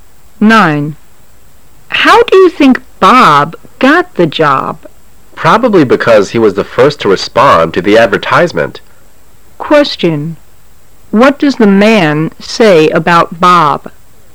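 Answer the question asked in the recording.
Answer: Bob probably got the job because he answered the advertisement first.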